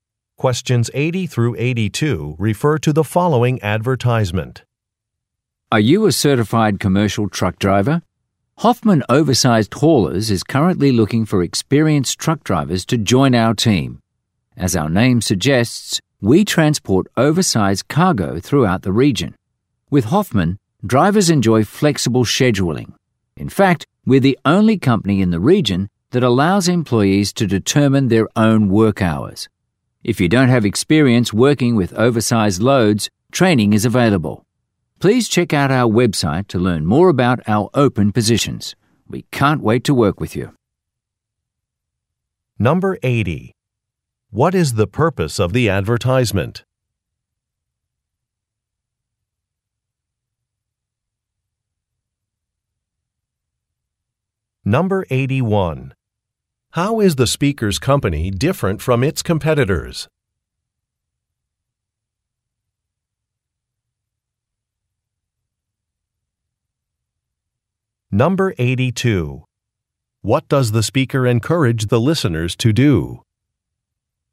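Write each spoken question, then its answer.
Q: What is the purpose of the advertisement?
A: To recruit truck drivers

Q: How is the speaker's company different from its competitors?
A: Employees set their own work hours

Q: What does the speaker encourage the listeners to do?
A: Visit the website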